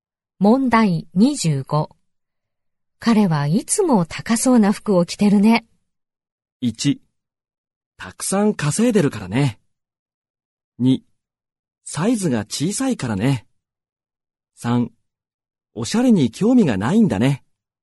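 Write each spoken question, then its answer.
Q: 彼はいつも高そうな服を着てるね。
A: 1: たくさん稼いでるからね。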